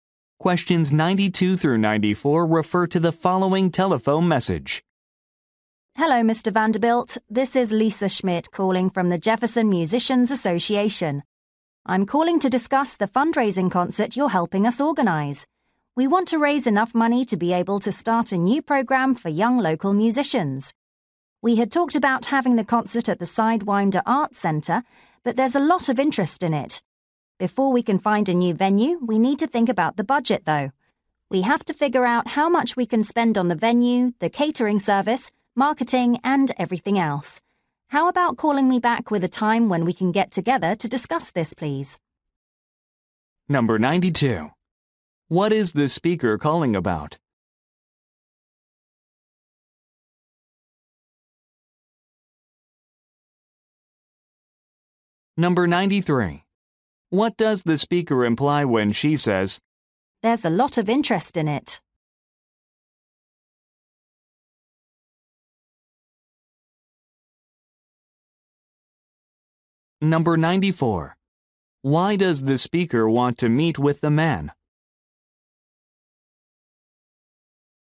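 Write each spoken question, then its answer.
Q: What is the speaker calling about?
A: A fundraising concert

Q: Why does the speaker want to meet with the man?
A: To discuss the budget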